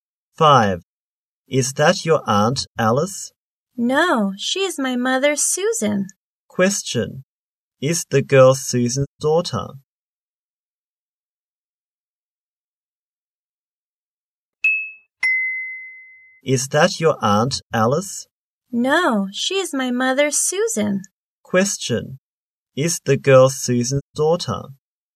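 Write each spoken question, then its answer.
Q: Is the girl Susan's daughter?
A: Yes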